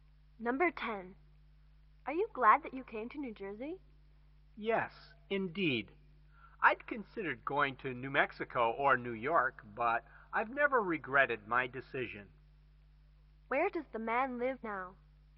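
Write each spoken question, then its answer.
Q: Where does the man live now?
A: New Jersey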